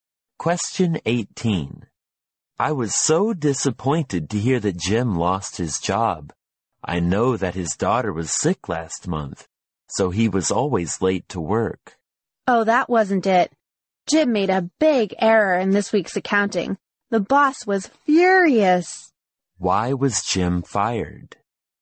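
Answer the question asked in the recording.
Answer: He made a big error in this week's accounting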